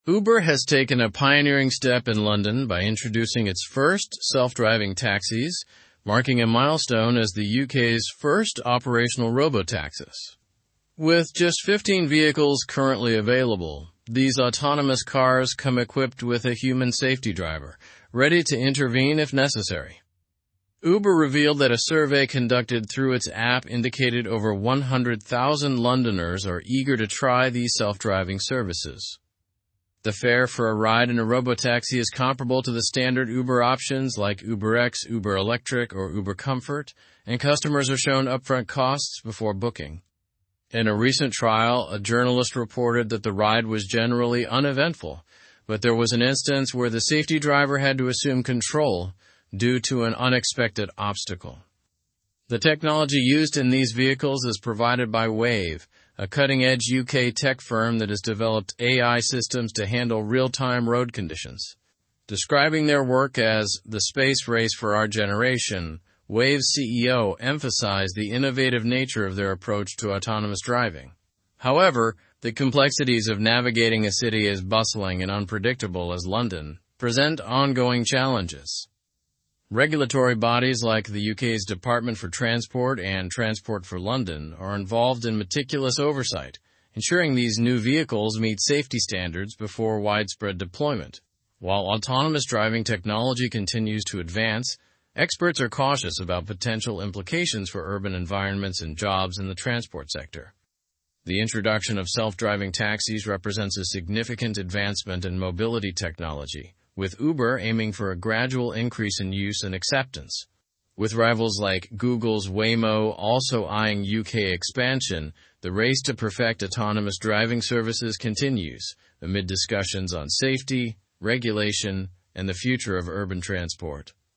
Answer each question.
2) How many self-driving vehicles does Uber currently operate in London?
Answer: Uber currently operates 15 self-driving vehicles in London.

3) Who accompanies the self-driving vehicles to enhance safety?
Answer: A human safety driver accompanies each autonomous car to ensure safety.

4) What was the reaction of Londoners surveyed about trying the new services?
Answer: Over 100,000 Londoners expressed their eagerness to try these services.

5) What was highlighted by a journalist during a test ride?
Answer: A journalist noted that the test ride was uneventful, although the safety driver had to take control due to an unexpected obstacle.

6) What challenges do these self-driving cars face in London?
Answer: The cars face challenges in navigating London's bustling and unpredictable environment.

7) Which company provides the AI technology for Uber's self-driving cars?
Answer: The technology is provided by Wayve, a UK-based tech firm.

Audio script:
Uber has taken a pioneering step in London by introducing its first self-driving taxis, marking a milestone as the UK's first operational robotaxis. With just 15 vehicles currently available, these autonomous cars come equipped with a human safety driver, ready to intervene if necessary. Uber revealed that a survey conducted through its app indicated over 100,000 Londoners are eager to try these self-driving services.
The fare for a ride in a robotaxi is comparable to the standard Uber options like UberX, Uber Electric, or Uber Comfort, and customers are shown upfront costs before booking. In a recent trial, a journalist reported that the ride was generally uneventful, but there was an instance where the safety driver had to assume control due to an unexpected obstacle.
The technology used in these vehicles is provided by Wayve, a cutting-edge UK tech firm that has developed AI systems to handle real-time road conditions. Describing their work as 'the space race for our generation,' Wayve's CEO emphasized the innovative nature of their approach to autonomous driving. However, the complexities of navigating a city as bustling and unpredictable as London present ongoing challenges.
Regulatory bodies like the UK's Department for Transport and Transport for London are involved in meticulous oversight, ensuring these new vehicles meet safety standards before widespread deployment. While autonomous driving technology continues to advance, experts are cautious about potential implications for urban environments and jobs in the transport sector.
The introduction of self-driving taxis represents a significant advancement in mobility technology, with Uber aiming for a gradual increase in use and acceptance. With rivals like Google's Waymo also eyeing UK expansion, the race to perfect autonomous driving services continues, amid discussions on safety, regulation, and the future of urban transport.

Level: Level 4